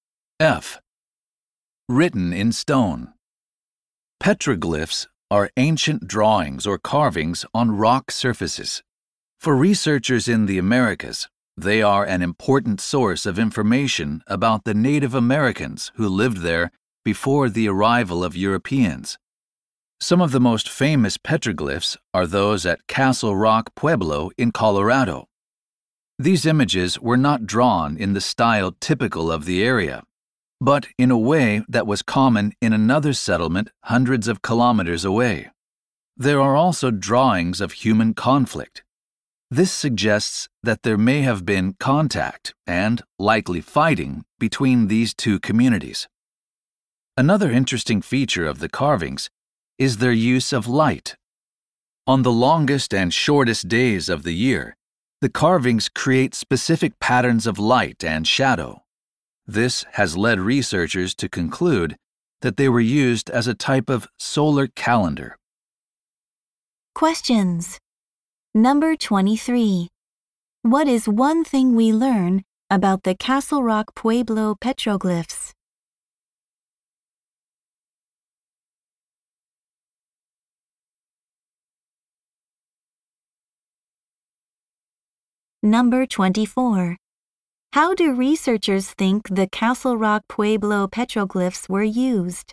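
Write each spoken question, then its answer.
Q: What is one thing we learn about the Castle Rock Pueblo petroglyphs?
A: They were drawn in a style common in another settlement hundreds of kilometers away.

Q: How do researchers think the Castle Rock Pueblo petroglyphs were used?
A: As a type of solar calendar.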